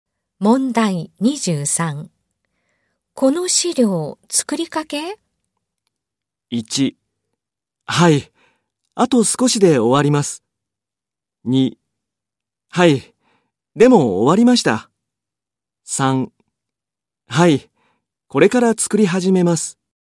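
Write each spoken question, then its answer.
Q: この資料、作りかけ?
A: 1: はい。あと少しで終わります。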